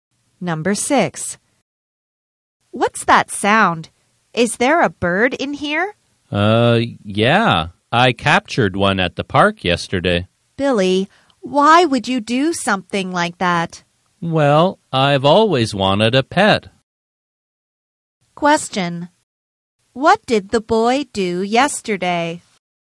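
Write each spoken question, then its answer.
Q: What did the boy do yesterday?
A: He captured a bird at the park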